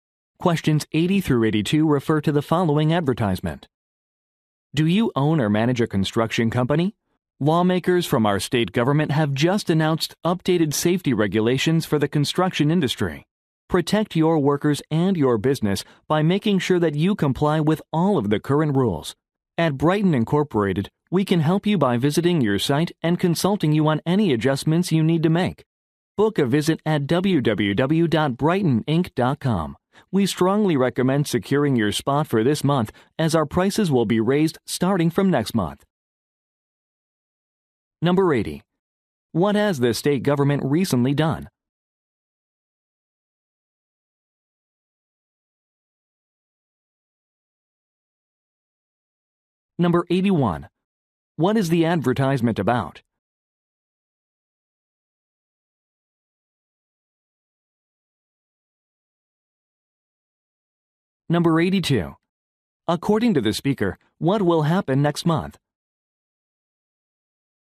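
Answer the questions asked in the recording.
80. Updated safety regulations for construction
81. A safety consulting service
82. Prices will go up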